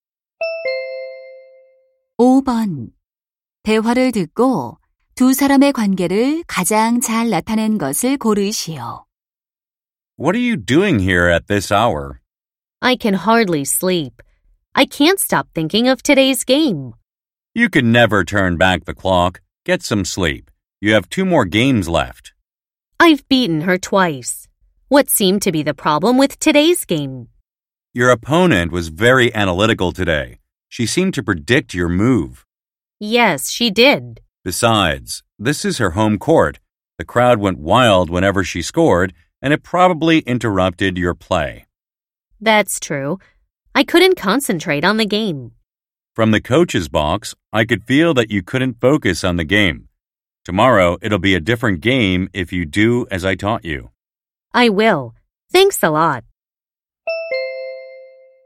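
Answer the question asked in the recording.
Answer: 코치와 선수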